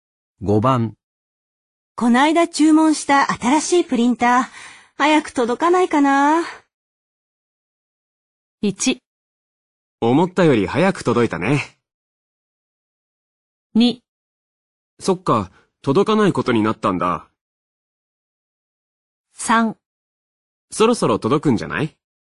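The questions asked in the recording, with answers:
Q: こないだ注文した新しいプリンター、早く届かないかな。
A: 3: そろそろ届くんじゃない?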